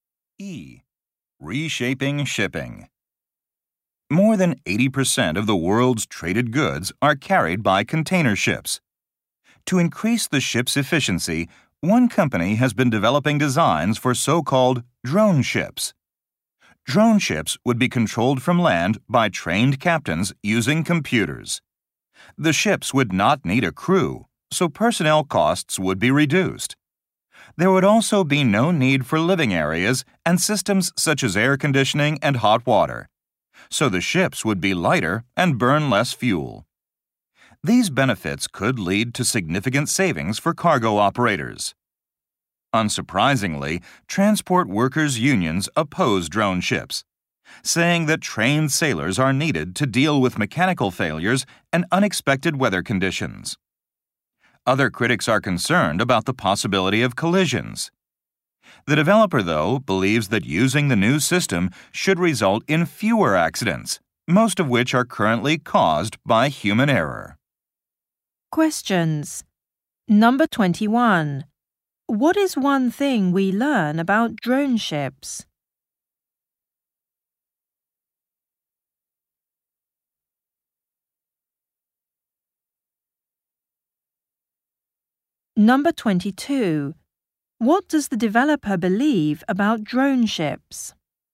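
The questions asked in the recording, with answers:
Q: What is one thing we learn about drone ships?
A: They would need no crew, so they would be lighter and cheaper to run.

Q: What does the developer believe about drone ships?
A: They would lead to fewer accidents.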